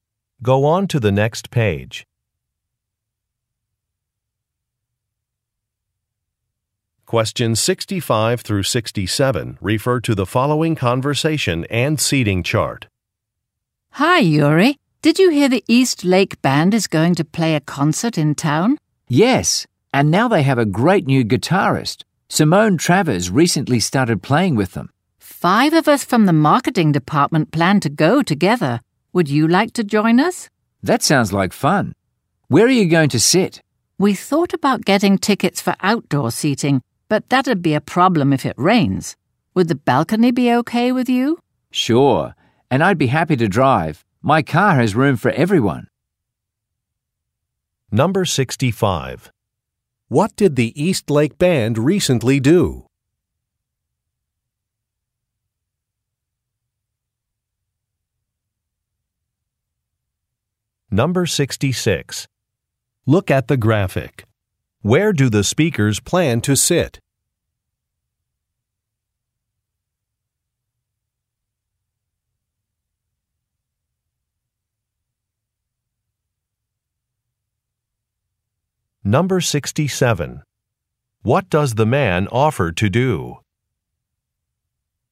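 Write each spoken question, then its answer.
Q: What did the East Lake Band recently do?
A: They added a new guitarist (Simone Travers).

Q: What does the man offer to do?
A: Drive everyone to the concert.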